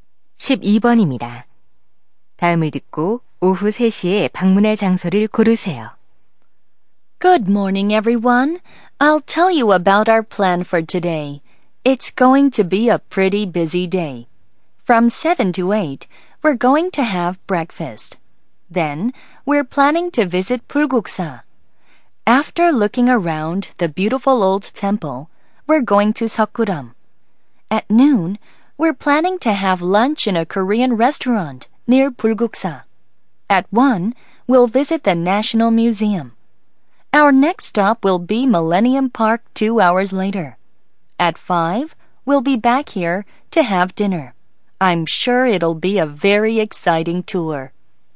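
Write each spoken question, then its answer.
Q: 다음을 듣고 오후 3시에 방문할 장소를 고르세요.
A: Millennium Park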